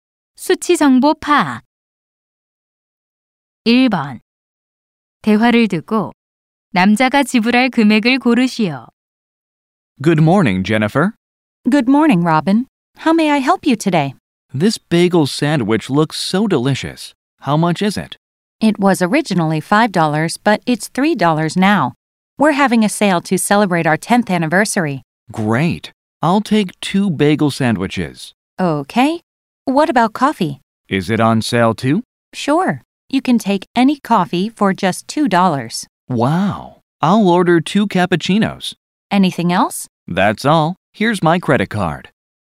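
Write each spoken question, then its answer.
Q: 대화를 듣고 남자가 지불할 금액을 고르시오.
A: $10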